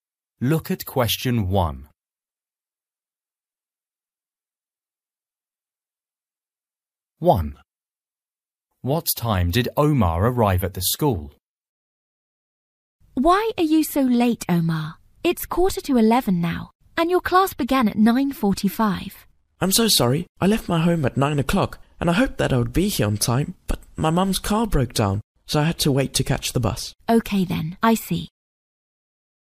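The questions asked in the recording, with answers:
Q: What time did Omar arrive at the school?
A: 10:45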